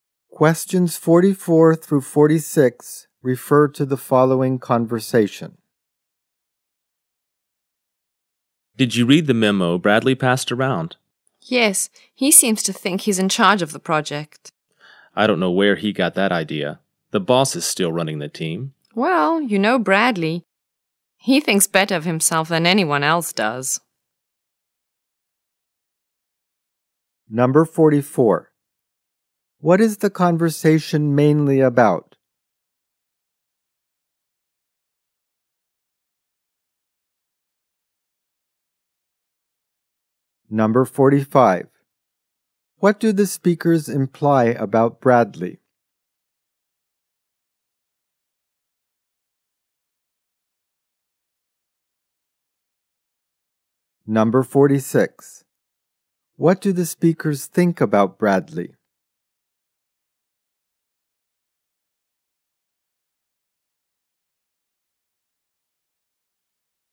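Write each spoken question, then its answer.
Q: What do the speakers think about Bradley?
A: He thinks too highly of himself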